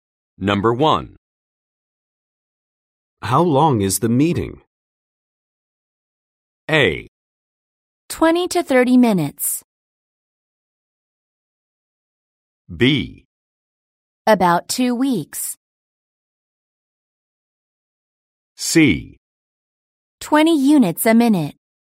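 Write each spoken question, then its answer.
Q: How long is the meeting?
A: A: 20 to 30 minutes.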